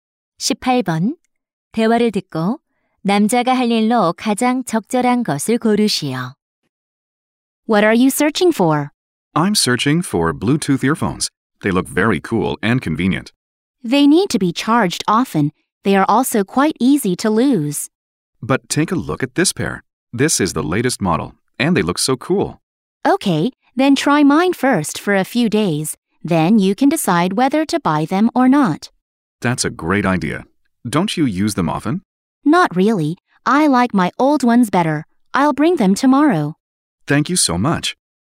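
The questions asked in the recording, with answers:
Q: 대화를 듣고 남자가 할 일로 가장 적절한 것을 고르시오.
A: 내일 자신의 블루투스 이어폰을 가져오기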